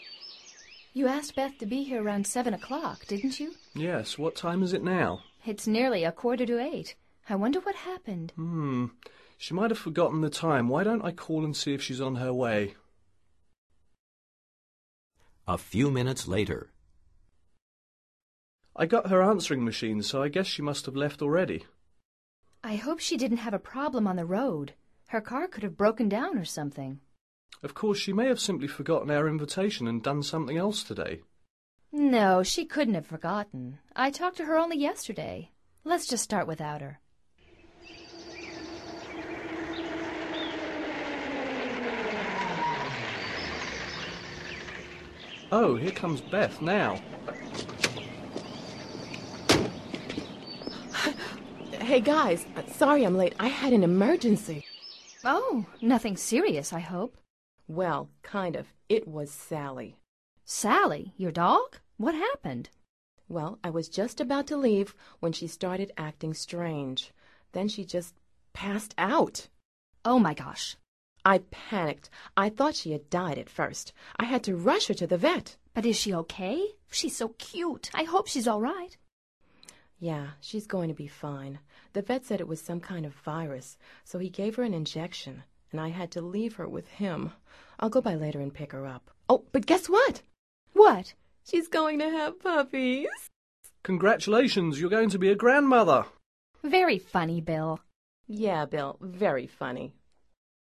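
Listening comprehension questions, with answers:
Activity 125: Basándote en los comentarios anteriores, selecciona las opciones más adecuadas para cada oración. Verifica luego las respuestas correctas.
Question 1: Why does Beth arrive so late?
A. She had an emergency.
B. Her car broke down.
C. She forgot their invitation.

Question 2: What happened to Sally?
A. She passed out.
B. She panicked.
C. She left the house.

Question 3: What did Beth decide to do?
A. To give Sally an injection.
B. To rush Sally for a check-up.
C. To leave Sally at home.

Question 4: The veterinarian said that ...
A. Sally was acting strange.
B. her dog was so cute.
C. it was some kind of virus.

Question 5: What was the veterinarian's diagnosis?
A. Sally's going to have puppies.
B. Sally's going to be a grandmother.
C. Sally needs an injection.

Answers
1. A
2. A
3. B
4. C
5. A

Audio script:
You asked Beth to be here around seven o'clock, didn't you?
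Bill:
Yes. What time is it now?
It's nearly a quarter to eight. I wonder what happened.
Bill:
She might have forgotten the time. Why don't I call and see if she's on her way?
A few minutes later ...
Bill:
I got her answering machine, so I guess she must have left already.
I hope she didn't have a problem on the road. Her car could have broken down or something.
Bill:
Of course she may have simply forgotten our invitation and done something else today.
No, she couldn't have forgotten. I talked to her only yesterday. Let's just start without her.
Bill:
Oh, here comes Beth now.
Beth:
Hey, guys. Sorry I'm late. I had an emergency.
Oh. Nothing serious I hope.
Beth:
Well, kind of. It was Sally.
Sally, your dog? What happened?
Beth:
Well, I was just about to leave when she started acting strange. Then she just passed out.
Oh, my gosh.
Beth:
I panicked. I thought she had died at first. I had to rush her to the vet.
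But is she OK? She's so cute. I hope she's all right.
Beth:
Yeah, she's going to be fine. The vet said it was some kind of virus. So he gave her an injection, and I had to leave her with him. I'll go by later and pick her up. Oh, but guess what!
What?
Beth:
She's going to have puppies!
Bill:
Congratulations! You're going to be a grandmother!
Very funny, Bill!
Beth:
Yeah, Bill. Very funny!

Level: Nivel Avanzado

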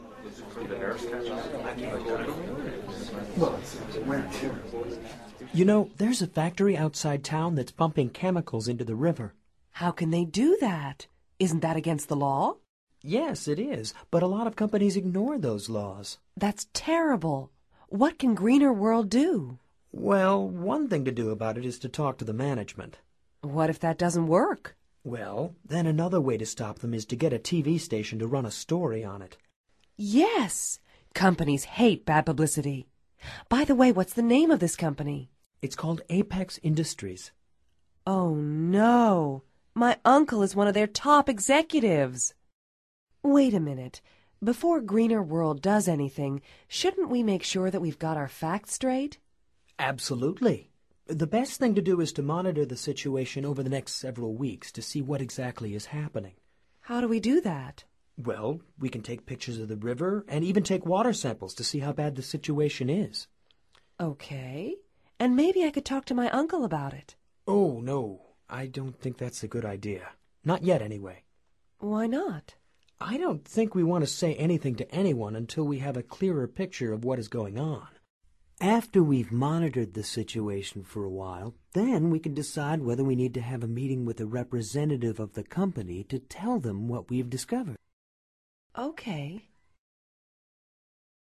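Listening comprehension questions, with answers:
Activity 107: Basándote en los comentarios anteriores, selecciona las opciones más adecuadas para cada oración. Verifica luego las respuestas correctas.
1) What environmental issue are they talking about?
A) Industrial waste in a factory.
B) Pumping chemicals into the river.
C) Water pollution in the river.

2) Apex Industries ...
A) does not ignore the law.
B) is polluting the river.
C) pumping water samples.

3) Who works at Apex Industries?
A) One of Sylvia's friends.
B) One of Sylvia's relatives.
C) Paul's uncle.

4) What do Paul and Sylvia decide to do?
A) Monitor the situation.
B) Take pictures of the factory.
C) Pump water samples into the river.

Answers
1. C
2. B
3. B
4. A

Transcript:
You know, there's a factory outside town that's pumping chemicals into the river.
How can they do that? Isn't that against the law?
Yes, it is. But a lot of companies ignore those laws.
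That's terrible! What can Greener World do?
Well, one thing to do about it is to talk to the management.
What if that doesn't work?
Well, then another way to stop them is to get a TV station to run a story on it.
Yes! Companies hate bad publicity. By the way, what's the name of this company?
It's called Apex Industries.
Oh no! My uncle is one of their top executives! Wait a minute. Before Greener World does anything, shouldn't we make sure that we've got our facts straight?
Absolutely. The best thing to do is to monitor the situation over the next several weeks to see what exactly is happening.
How do we do that?
Well, we can take pictures of the river and even take water samples to see how bad the situation is.
OK. And maybe I could talk to my uncle about it.
Oh, no, I don't think that's a good idea. Not yet, anyway.
Why not?
I don't think we want to say anything to anyone until we have a clearer picture of what is going on. 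After we've monitored the situation for a while, then we can decide whether we need to have a meeting with a representative of the company to tell them what we've discovered.

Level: Nivel Avanzado

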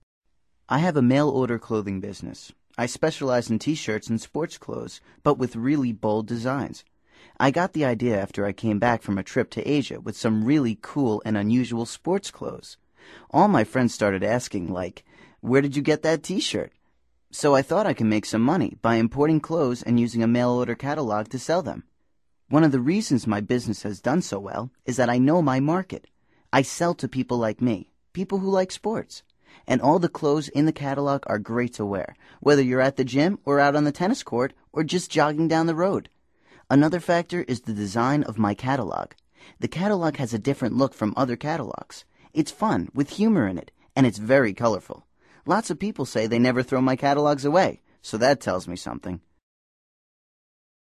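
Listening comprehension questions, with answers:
Activity 88: Basándote en los comentarios anteriores, selecciona las opciones más adecuadas para cada oración. Verifica luego las respuestas correctas.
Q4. What does Billy specialize in?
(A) T-shirts and sports clothes.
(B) Modest T-shirt designs.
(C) Usual sports clothes and T-shirts.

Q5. When did he get the idea for his business?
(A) After coming back from Spain.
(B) After returning from Asia.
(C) During a trip to the California area.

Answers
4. A
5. B

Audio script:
I have a mail-order clothing business. I specialize in T-shirts and sports clothes, but with really bold designs. I got the idea after I came back from a trip to Asia with some really cool and unusual sports clothes. All my friends started asking, like, "Where did you get that T-shirt?" So I thought I could make some money by importing clothes and using a mail-order catalog to sell them. 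One of the reasons my business has done so well is that I know my market. I sell to people like me – people who like sports – and all the clothes in the catalog are great to wear whether you're at the gym or out on the tennis court or just jogging down the road. Another factor is the design of my catalog: The catalog has a different look from other catalogs. It's fun, with humor in it, and it's very colorful. Lots of people say they never throw my catalogs away, so that tells me something.

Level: Nivel Avanzado

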